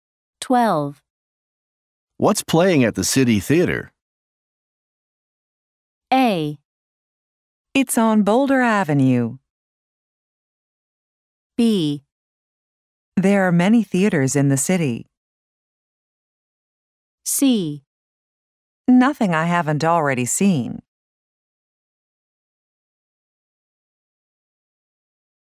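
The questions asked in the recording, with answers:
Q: What's playing at the City Theater?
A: C: Nothing I haven't already seen.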